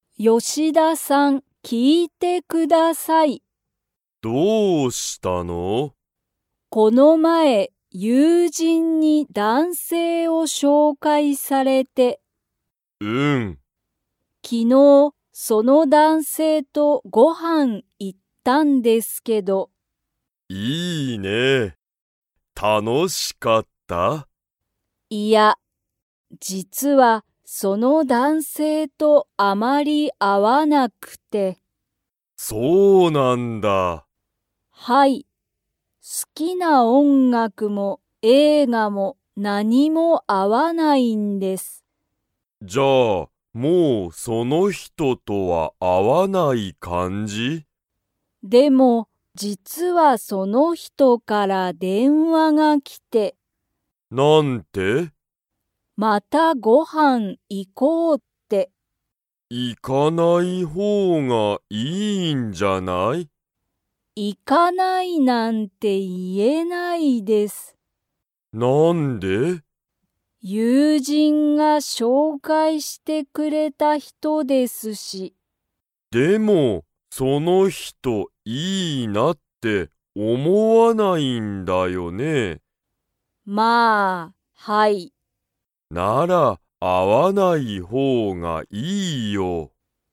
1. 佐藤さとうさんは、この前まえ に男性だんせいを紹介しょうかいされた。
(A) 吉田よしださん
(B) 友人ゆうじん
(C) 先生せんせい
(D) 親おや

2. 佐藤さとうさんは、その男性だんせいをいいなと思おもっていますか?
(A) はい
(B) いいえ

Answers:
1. B
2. B

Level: Level 3

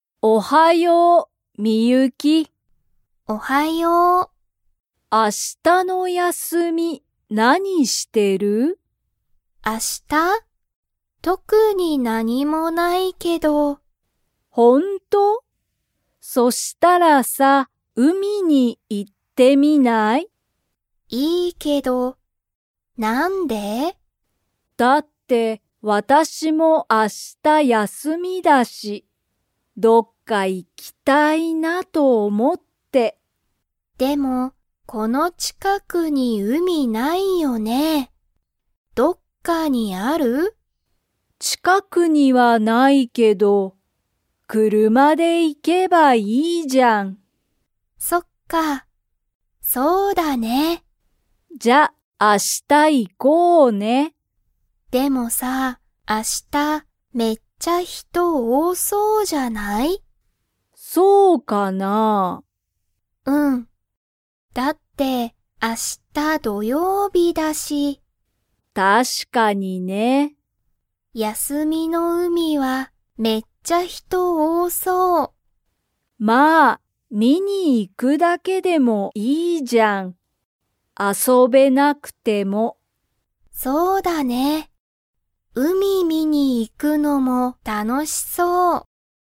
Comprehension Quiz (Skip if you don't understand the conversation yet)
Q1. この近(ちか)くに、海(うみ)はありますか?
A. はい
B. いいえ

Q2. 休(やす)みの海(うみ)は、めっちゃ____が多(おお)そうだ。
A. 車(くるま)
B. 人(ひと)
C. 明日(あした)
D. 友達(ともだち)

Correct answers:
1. B
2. B

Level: Level 2

